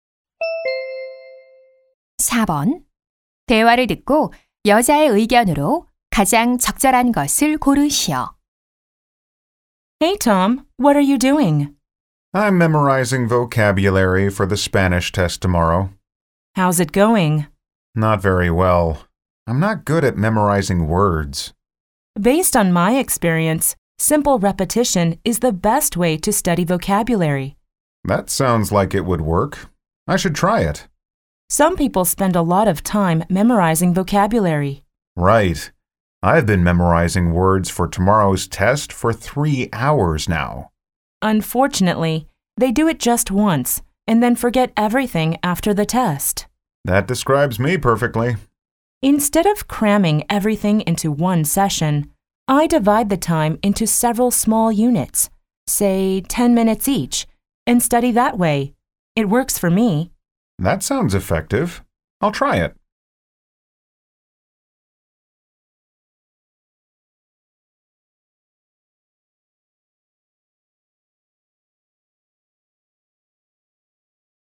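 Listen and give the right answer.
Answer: 어휘는 짧은 시간으로 나누어 여러 번 반복해 공부하는 것이 효과적이다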